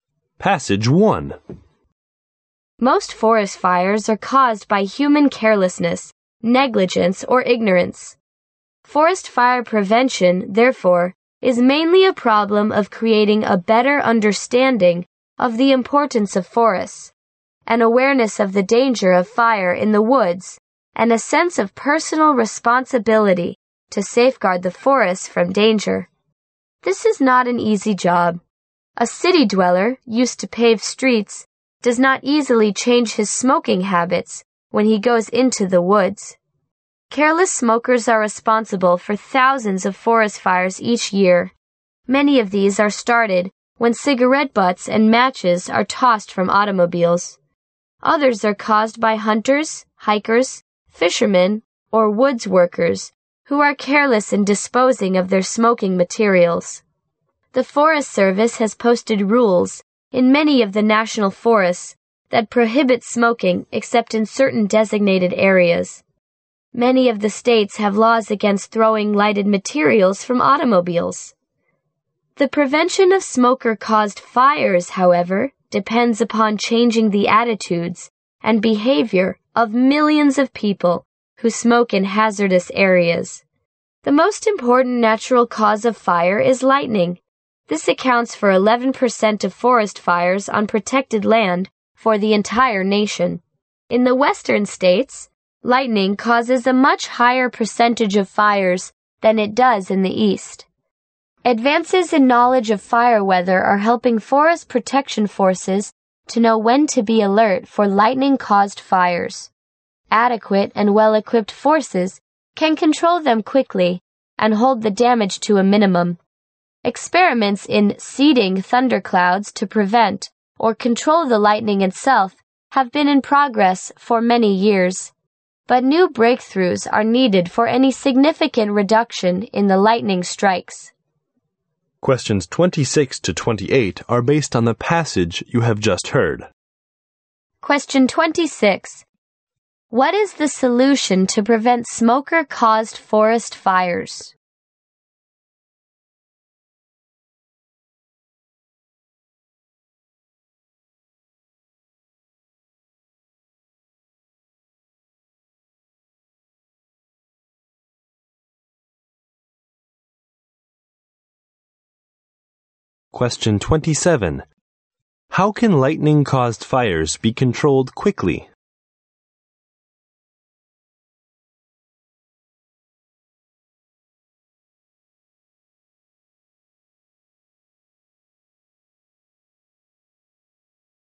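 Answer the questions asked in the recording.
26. Changing the attitudes and behavior of people who smoke in hazardous areas
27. By adequate and well-equipped forces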